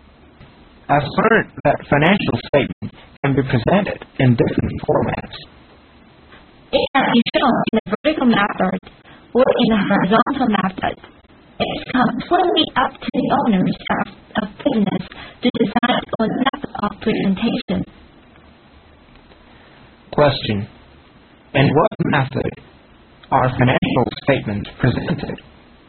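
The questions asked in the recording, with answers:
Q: In what method are financial statements presented?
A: In either a vertical or a horizontal method, as the owners decide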